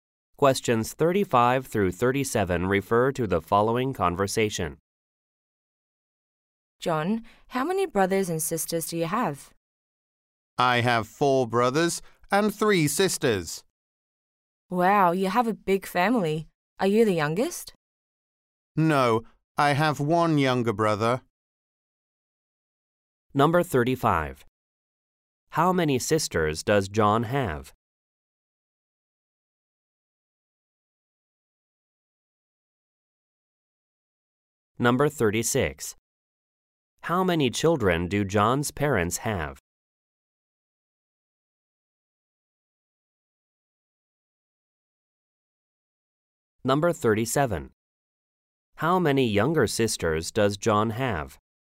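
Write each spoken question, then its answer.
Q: How many younger sisters does John have?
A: None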